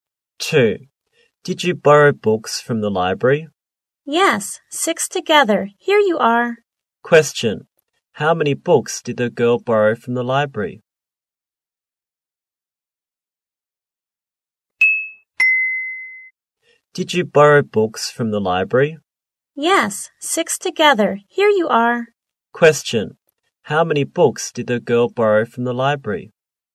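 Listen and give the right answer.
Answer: Six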